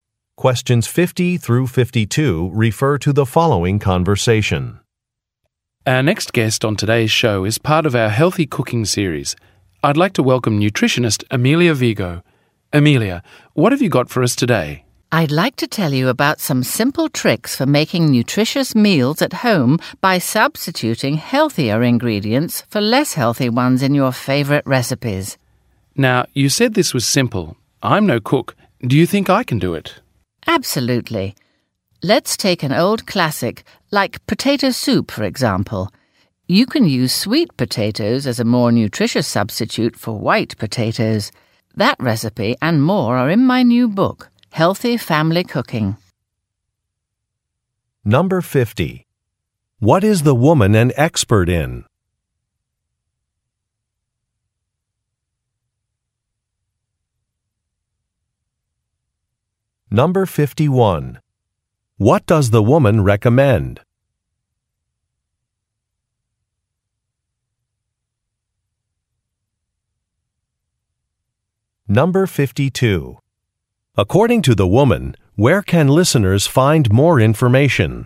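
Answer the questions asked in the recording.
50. Nutrition
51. Substituting healthier ingredients in recipes
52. In her new book, Healthy Family Cooking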